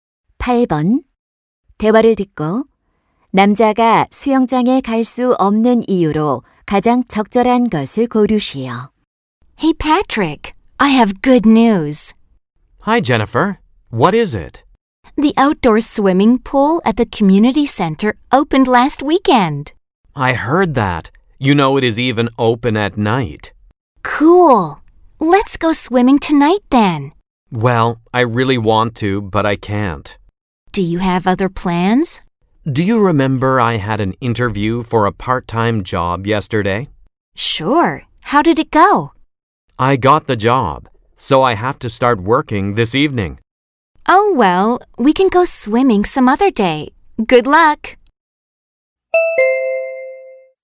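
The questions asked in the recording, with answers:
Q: 대화를 듣고 남자가 수영장에 갈 수 없는 이유로 가장 적절한 것을 고르시오.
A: 오늘 저녁부터 아르바이트를 시작해야 해서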